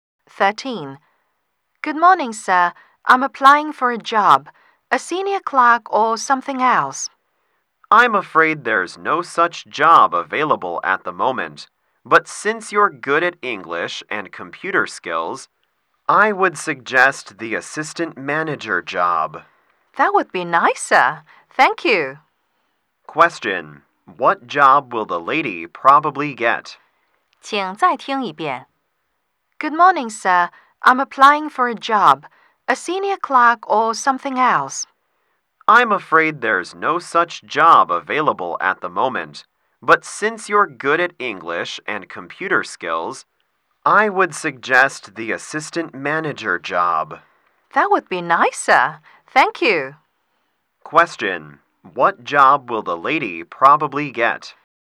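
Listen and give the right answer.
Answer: Assistant manager.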